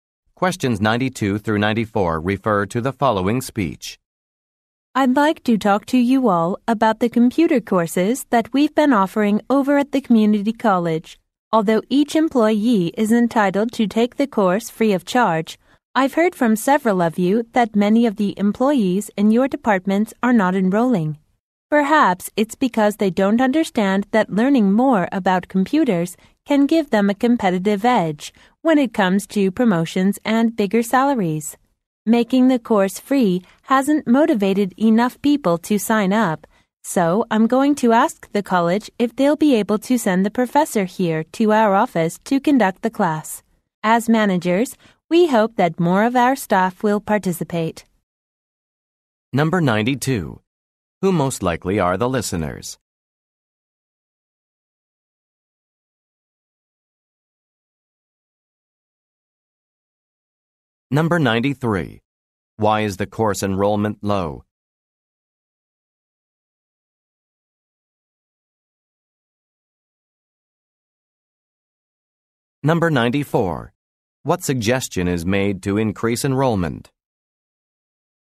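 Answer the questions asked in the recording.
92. Managers
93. Employees don't see how it can help them get promotions and higher pay
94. Having the professor teach the class at the office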